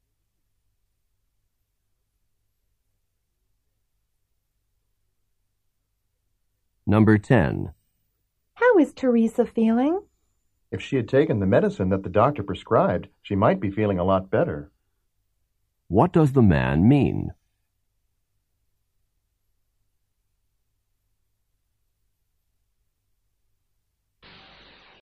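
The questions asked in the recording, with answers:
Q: What does the man mean?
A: Teresa didn't take her medicine and isn't feeling well.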